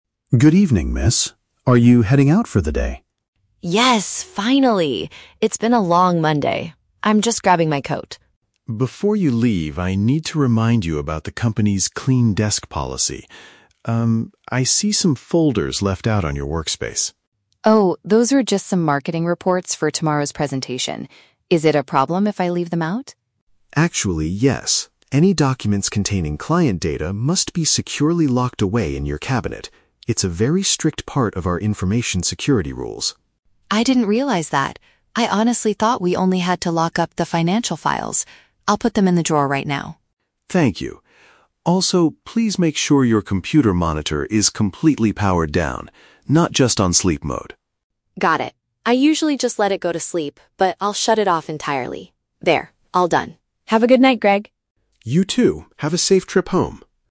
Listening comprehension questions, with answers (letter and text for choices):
Listen to the conversation between a security guard and an office worker, then choose the correct answer (A, B, or C).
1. What is the main issue the security guard points out to the office worker?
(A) She forgot to take her winter coat before leaving the office.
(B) She lost the key to her personal filing cabinet.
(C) She left confidential paperwork on top of her table.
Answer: (C) She left confidential paperwork on top of her table.

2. What did Sarah incorrectly believe about the security rules?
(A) She assumed she could ask the security guard to lock the drawer for her.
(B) She thought the locking policy only applied to accounting records.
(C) She believed that marketing reports should be thrown in the trash.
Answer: (B) She thought the locking policy only applied to accounting records.

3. What does Greg ask Sarah to do with her computer equipment?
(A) Turn the screen off entirely before going home.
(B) Put the machine into a temporary sleep mode to save energy.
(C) Take the laptop with her so she can work from home.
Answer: (A) Turn the screen off entirely before going home.

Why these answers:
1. Greg notices "folders left out on your workspace" that contain "client data" and tells her they must be locked away. Option C paraphrases this as leaving "confidential paperwork on top of her table".
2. Sarah admits she "thought we only had to lock up the financial files." Option B perfectly paraphrases "financial files" as "accounting records."
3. Greg asks her to make sure her "computer monitor is completely powered down." Option A uses synonyms ("turn the screen off entirely") to capture this instruction.

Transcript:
Greg: Good evening, miss. Are you heading out for the day?
Sarah: Yes, finally! It's been a long Monday. I'm just grabbing my coat.
Greg: Before you leave, I need to remind you about the company's clean desk policy. Um, I see some folders left out on your workspace.
Sarah: Oh, those are just some marketing reports for tomorrow's presentation. Is it a problem if I leave them out?
Greg: Actually, yes. Any documents containing client data must be securely locked away in your cabinet. It's a very strict part of our information security rules.
Sarah: I didn't realize that. I honestly thought we only had to lock up the financial files. I'll put them in the drawer right now.
Greg: Thank you. Also, please make sure your computer monitor is completely powered down, not just on sleep mode.
Sarah: Got it. I usually just let it go to sleep, but I'll shut it off entirely. There, all done. Have a good night, Greg!
Greg: You too. Have a safe trip home.